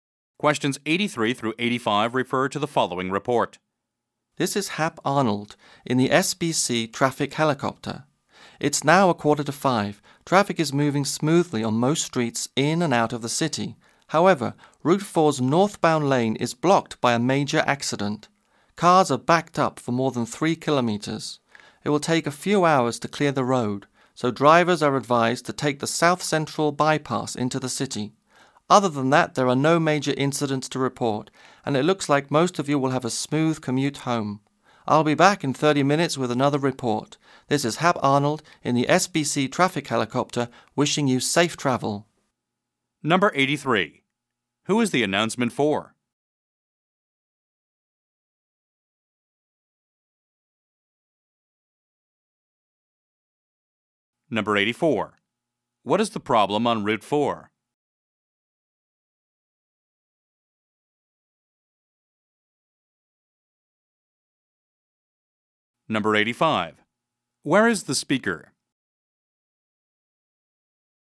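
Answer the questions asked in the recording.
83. Drivers
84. A major accident is blocking the northbound lane
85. In a traffic helicopter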